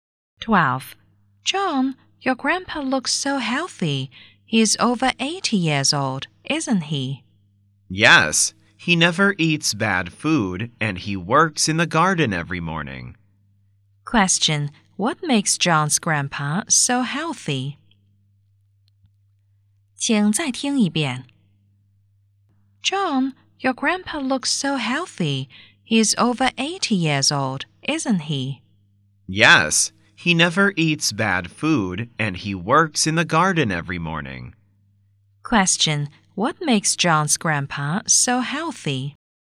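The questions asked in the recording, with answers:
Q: Question.What makes John's grandpa so healthy?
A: He never eats bad food and works in the garden every morning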